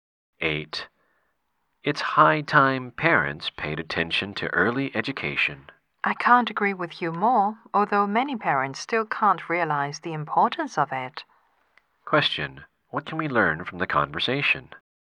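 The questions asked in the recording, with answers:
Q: What can we learn from the conversation?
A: Early education is important, but many parents don't realize it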